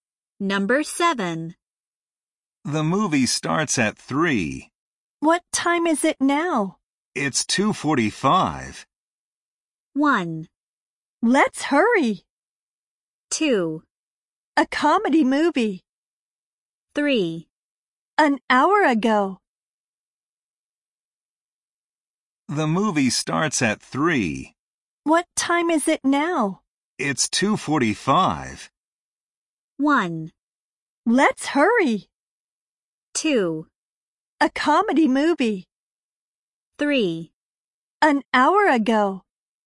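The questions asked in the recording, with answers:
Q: It's 2:45.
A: 1: Let's hurry.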